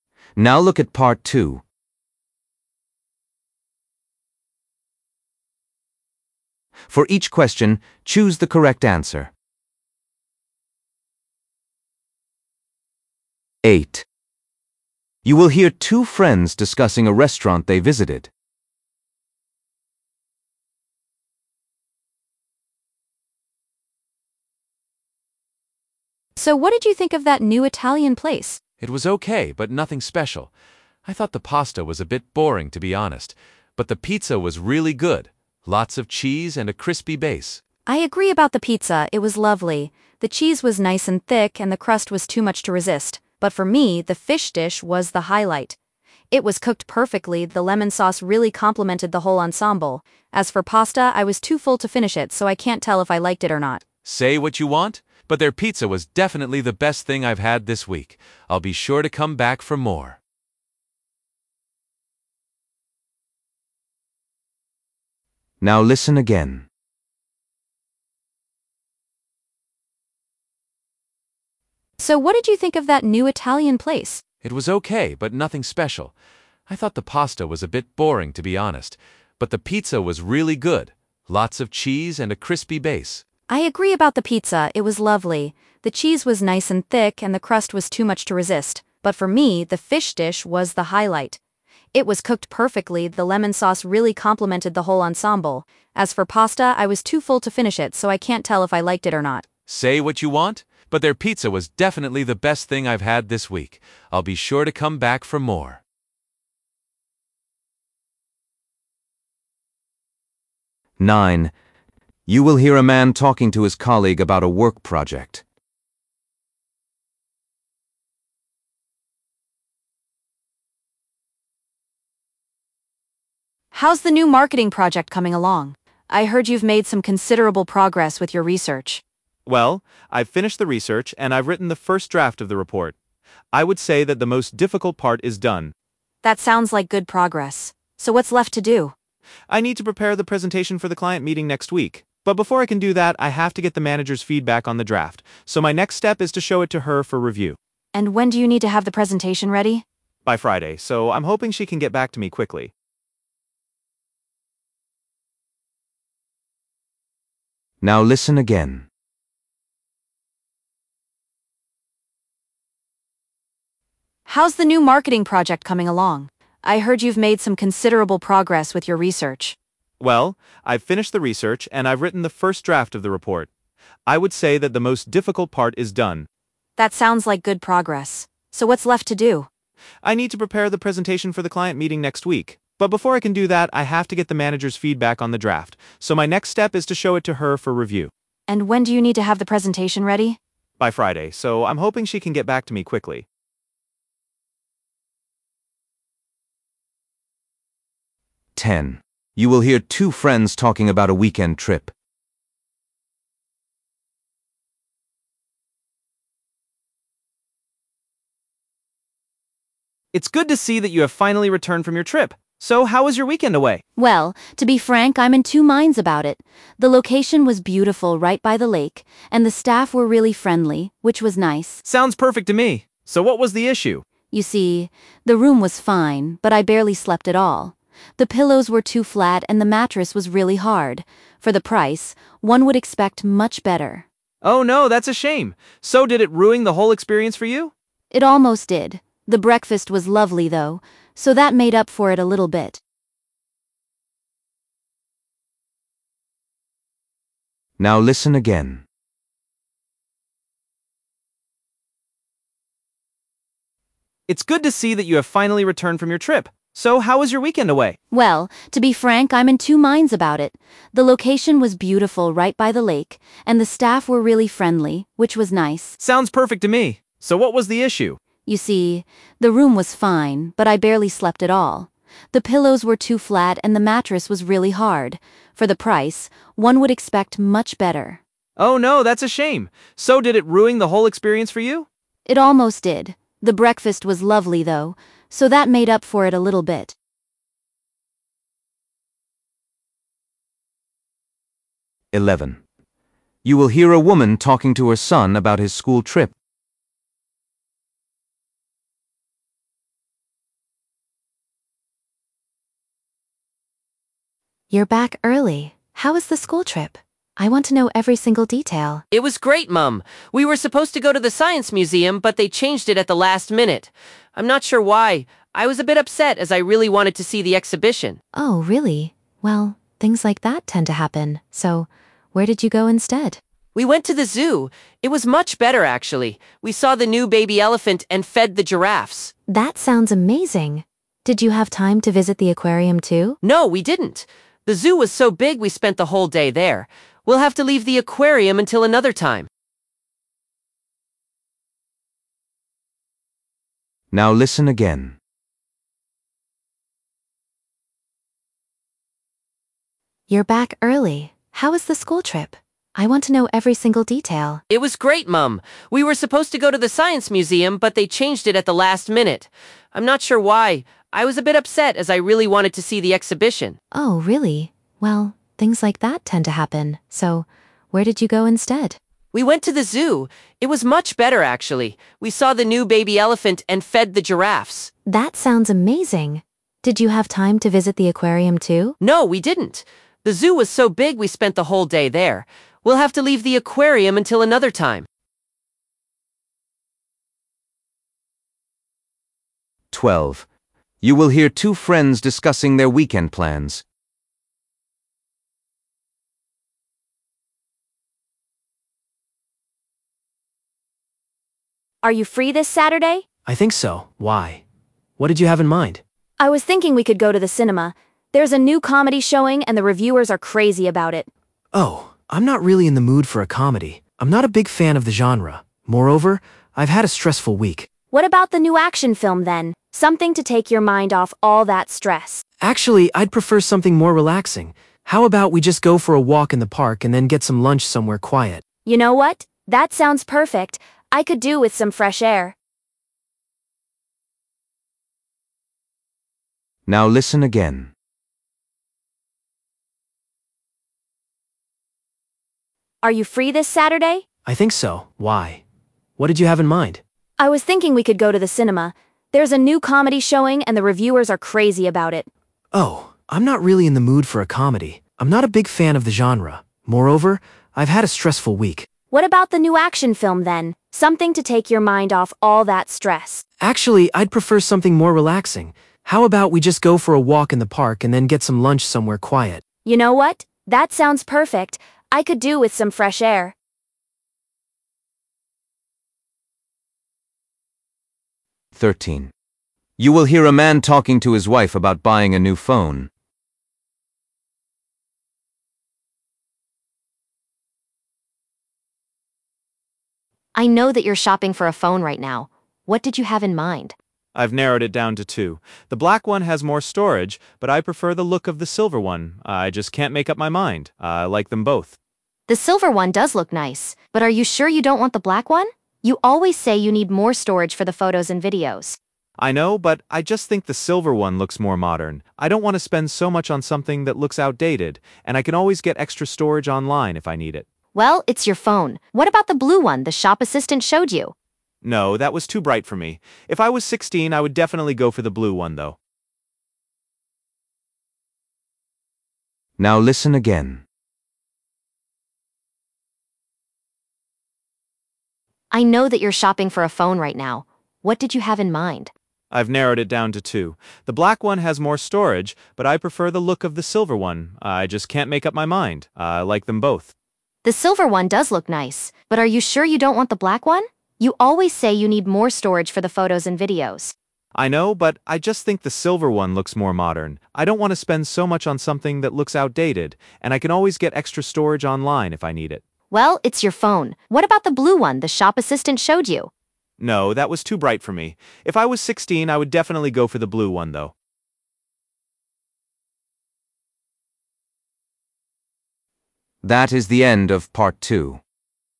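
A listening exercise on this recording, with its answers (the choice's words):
For each question, choose the correct answer.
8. Which dish did the woman enjoy the most?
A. The pasta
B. The fish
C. The pizza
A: The fish

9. What does the man need to do next?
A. Finish the research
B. Send the draft to his manager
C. Prepare the presentation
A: Send the draft to his manager

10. What was the problem with the hotel?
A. The uncomfortable bed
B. The unfriendly staff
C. The poor breakfast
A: The uncomfortable bed

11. Where did the boy go on his school trip?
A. To the science museum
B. To the zoo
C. To the aquarium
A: To the zoo

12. What are the friends planning to do this weekend?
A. Go to the cinema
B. Go for a walk in the park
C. Go to the theatre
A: Go for a walk in the park

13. What colour phone does the man decide to buy?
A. Black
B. Silver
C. Blue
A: Silver

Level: B1 Preliminary (PET)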